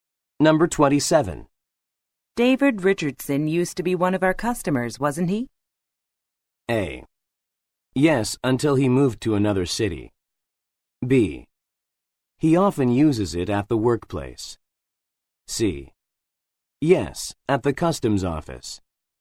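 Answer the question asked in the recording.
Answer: A: Yes, until he moved to another city.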